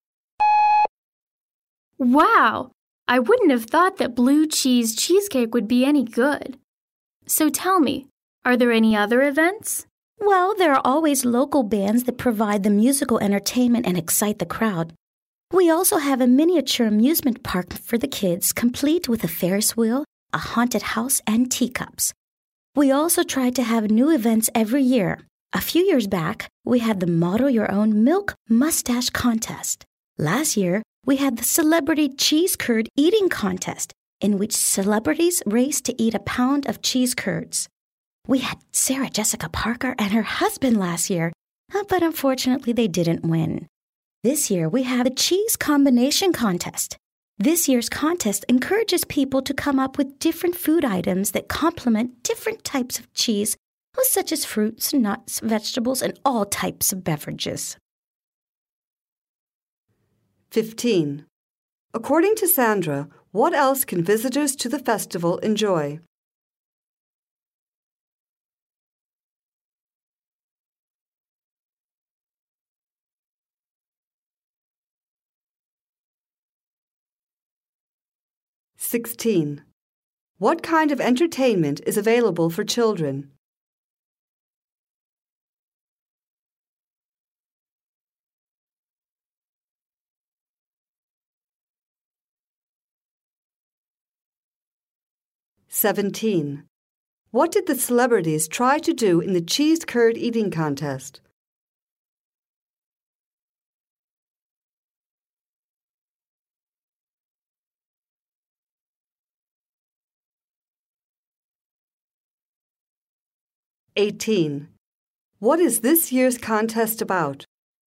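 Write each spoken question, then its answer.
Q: What kind of entertainment is available for children?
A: A miniature amusement park

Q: What did the celebrities try to do in the cheese curd eating contest?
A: Eat a pound of cheese curds the fastest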